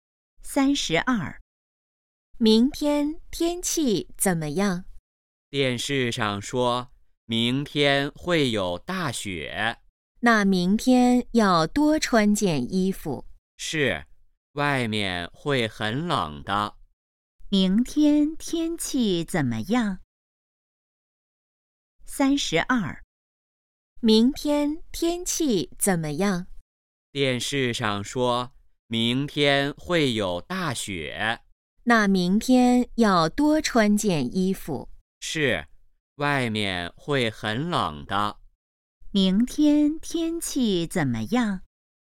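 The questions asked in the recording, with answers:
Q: 明天天气怎么样?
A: 会有大雪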